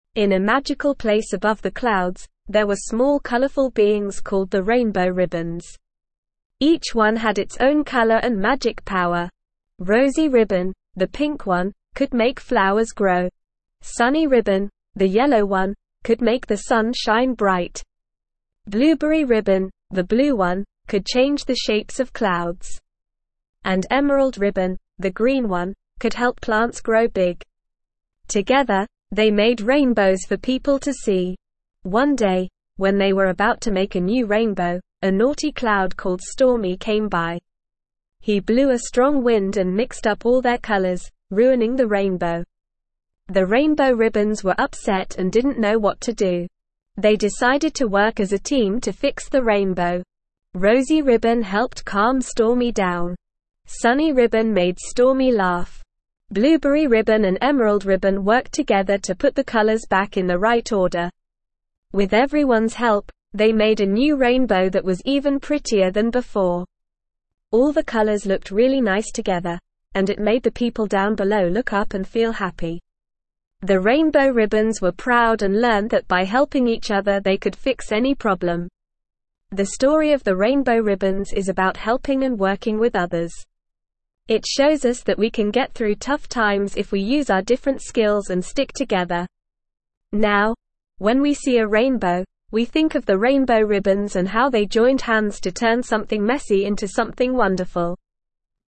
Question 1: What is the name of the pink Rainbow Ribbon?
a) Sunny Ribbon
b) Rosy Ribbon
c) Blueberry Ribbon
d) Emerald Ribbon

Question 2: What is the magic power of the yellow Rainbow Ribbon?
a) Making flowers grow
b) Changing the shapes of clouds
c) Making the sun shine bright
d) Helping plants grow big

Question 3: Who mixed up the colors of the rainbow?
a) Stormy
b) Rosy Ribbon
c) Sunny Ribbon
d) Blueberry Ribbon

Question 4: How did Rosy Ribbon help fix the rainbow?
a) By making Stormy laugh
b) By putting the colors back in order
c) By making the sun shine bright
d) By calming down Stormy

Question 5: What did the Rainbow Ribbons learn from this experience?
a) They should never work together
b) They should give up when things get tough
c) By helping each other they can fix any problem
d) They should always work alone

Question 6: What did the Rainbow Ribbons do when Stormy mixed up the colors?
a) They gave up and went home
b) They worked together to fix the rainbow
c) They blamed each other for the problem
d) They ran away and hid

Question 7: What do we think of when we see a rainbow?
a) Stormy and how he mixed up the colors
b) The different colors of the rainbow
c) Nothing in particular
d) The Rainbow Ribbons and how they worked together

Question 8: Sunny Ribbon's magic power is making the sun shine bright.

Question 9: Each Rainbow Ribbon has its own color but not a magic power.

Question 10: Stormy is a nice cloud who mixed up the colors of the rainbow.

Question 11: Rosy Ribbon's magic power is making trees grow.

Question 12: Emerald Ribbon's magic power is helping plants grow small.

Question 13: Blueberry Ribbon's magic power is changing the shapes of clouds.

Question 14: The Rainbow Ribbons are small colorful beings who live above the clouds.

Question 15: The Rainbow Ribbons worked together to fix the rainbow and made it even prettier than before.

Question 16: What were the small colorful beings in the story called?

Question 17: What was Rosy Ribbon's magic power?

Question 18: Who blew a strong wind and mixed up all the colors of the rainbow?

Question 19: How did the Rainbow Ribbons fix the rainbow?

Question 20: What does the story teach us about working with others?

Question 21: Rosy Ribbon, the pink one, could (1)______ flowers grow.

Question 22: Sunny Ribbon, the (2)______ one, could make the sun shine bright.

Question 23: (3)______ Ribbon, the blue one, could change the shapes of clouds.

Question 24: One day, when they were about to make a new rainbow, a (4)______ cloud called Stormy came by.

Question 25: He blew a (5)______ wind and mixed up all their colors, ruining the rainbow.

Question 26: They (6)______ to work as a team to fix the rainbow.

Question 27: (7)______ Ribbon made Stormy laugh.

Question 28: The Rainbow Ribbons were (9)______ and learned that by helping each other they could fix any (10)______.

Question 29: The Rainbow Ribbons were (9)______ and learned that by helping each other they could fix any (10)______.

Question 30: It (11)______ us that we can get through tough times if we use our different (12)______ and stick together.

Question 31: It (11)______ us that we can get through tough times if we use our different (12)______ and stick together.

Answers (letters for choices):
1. b
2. c
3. a
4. d
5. c
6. b
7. d
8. True
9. False
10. False
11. False
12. False
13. True
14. True
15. True
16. The small colorful beings in the story were called the Rainbow Ribbons.
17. Rosy Ribbon's magic power was being able to make flowers grow.
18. Stormy, the naughty cloud
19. The Rainbow Ribbons fixed the rainbow by working together.
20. The story teaches us that by working with others and using our different skills, we can overcome tough times and fix any problem.
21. make
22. yellow
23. Blueberry
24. naughty
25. strong
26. decided
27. Sunny
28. proud
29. problem
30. shows
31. skills

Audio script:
In a magical place above the clouds, there were small colorful beings called the Rainbow Ribbons. Each one had its own color and magic power. Rosy Ribbon, the pink one, could make flowers grow. Sunny Ribbon, the yellow one, could make the sun shine bright. Blueberry Ribbon, the blue one, could change the shapes of clouds. And Emerald Ribbon, the green one, could help plants grow big. Together, they made rainbows for people to see.
One day, when they were about to make a new rainbow, a naughty cloud called Stormy came by. He blew a strong wind and mixed up all their colors, ruining the rainbow. The Rainbow Ribbons were upset and didn't know what to do.
They decided to work as a team to fix the rainbow. Rosy Ribbon helped calm Stormy down. Sunny Ribbon made Stormy laugh. Blueberry Ribbon and Emerald Ribbon worked together to put the colors back in the right order.
With everyone's help, they made a new rainbow that was even prettier than before. All the colors looked really nice together, and it made the people down below look up and feel happy. The Rainbow Ribbons were proud and learned that by helping each other they could fix any problem.
The story of the Rainbow Ribbons is about helping and working with others. It shows us that we can get through tough times if we use our different skills and stick together. Now, when we see a rainbow, we think of the Rainbow Ribbons and how they joined hands to turn something messy into something wonderful.

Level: Level 2